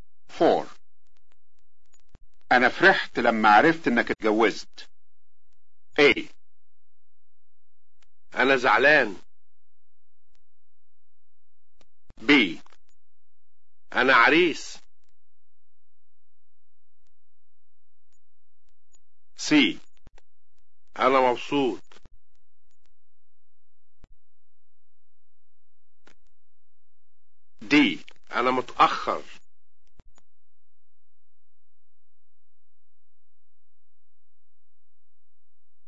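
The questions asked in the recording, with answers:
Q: أنا فرحت لما عرفت إنك اتجوزت.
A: C: أنا مبسوط.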